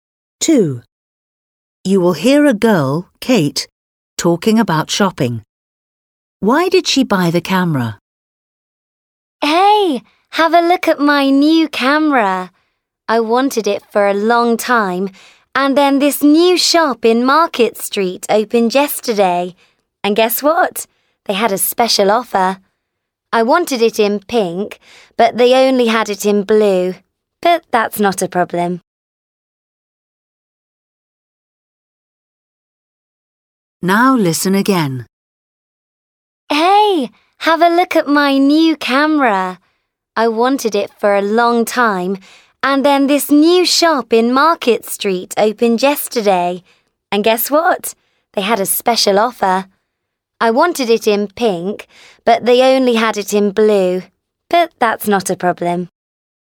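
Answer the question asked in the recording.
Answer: there was a special offer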